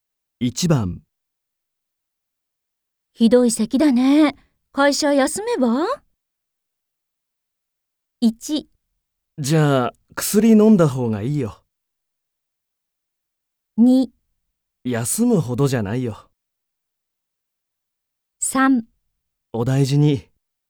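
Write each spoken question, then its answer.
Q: ひどい咳だね。会社休めば?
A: 2: 休むほどじゃないよ。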